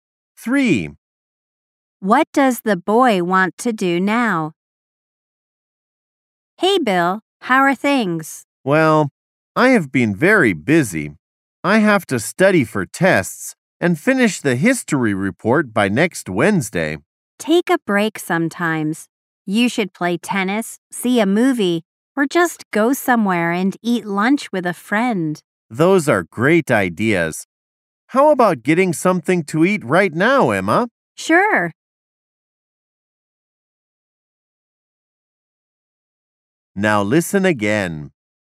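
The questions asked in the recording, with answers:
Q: What does the boy want to do now?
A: Get something to eat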